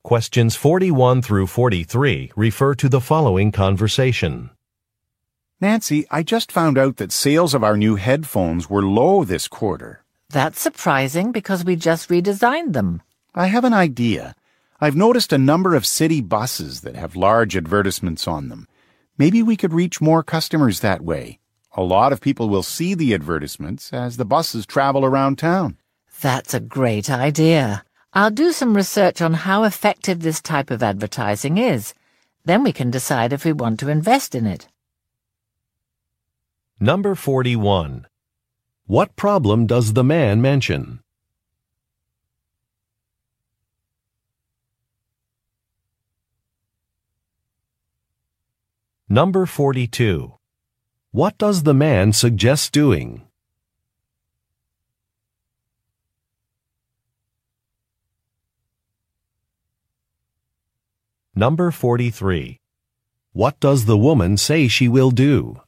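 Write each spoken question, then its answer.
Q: What problem does the man mention?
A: Sales of the new headphones were low.

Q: What does the man suggest doing?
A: Advertising on city buses.

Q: What does the woman say she will do?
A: Research how effective bus advertising is.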